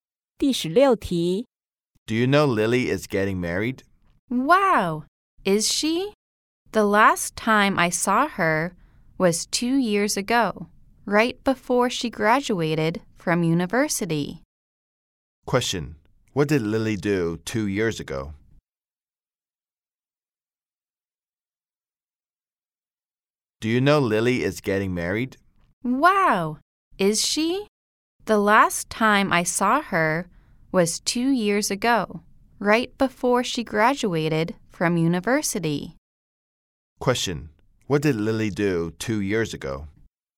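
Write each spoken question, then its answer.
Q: Question: What did Lily do 2 years ago?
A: She graduated from university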